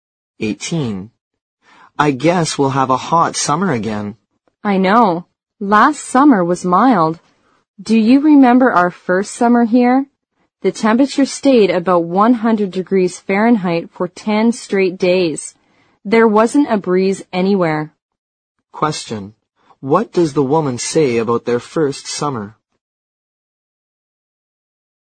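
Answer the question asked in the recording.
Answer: It was very hot, about 100 degrees Fahrenheit for 10 days in a row, with no breeze.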